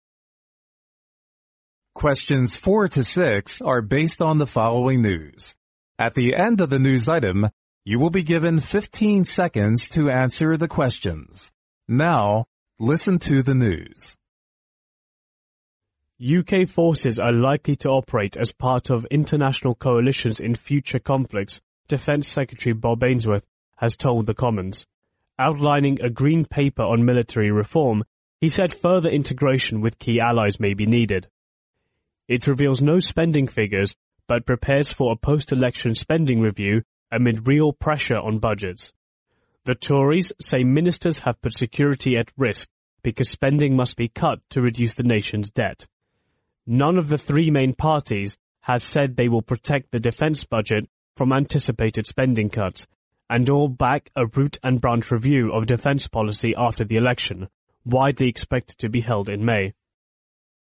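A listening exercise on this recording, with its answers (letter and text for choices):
Now listen to the news.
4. What is the news item mainly about?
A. Defense Secretary has promised UK forces will join in international operations.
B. Defense Secretary has denied UK forces,joining in international operations.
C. Defense Secretary has said UK forces will join in future international operations.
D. Defense Secretary has said UK forces will join in the EU coalitions in future conflicts.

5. We can infer from the news that UK's military reform possibly refers to_____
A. joining international coalitions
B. integration with the EU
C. cooperation with the US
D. being independent from the EU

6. Which statement is CORRECT about the three parties,decision about the defense budget?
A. All of them protect the defense budget from spending cuts.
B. All of them support a thorough review of defense policy after the election.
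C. None of them back a thorough review of defense policy.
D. Two of them protect the defense budget.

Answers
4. C. Defense Secretary has said UK forces will join in future international operations.
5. A. joining international coalitions
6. B. All of them support a thorough review of defense policy after the election.

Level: 专业四级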